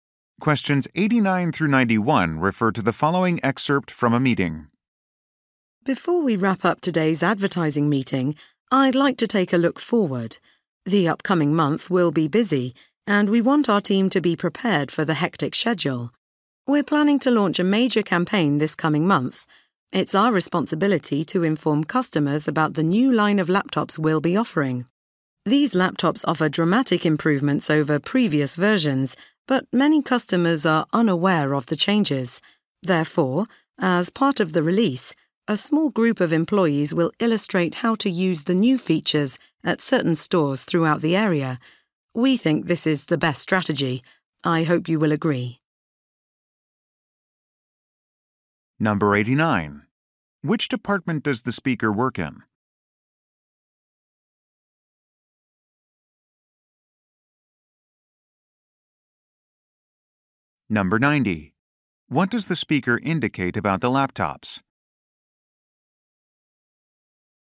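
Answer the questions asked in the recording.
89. Advertising
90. They are greatly improved over previous versions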